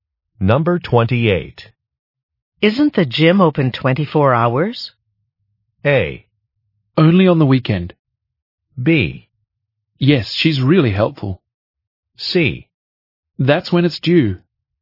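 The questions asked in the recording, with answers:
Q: Isn't the gym open 24 hours?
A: A: Only on the weekend.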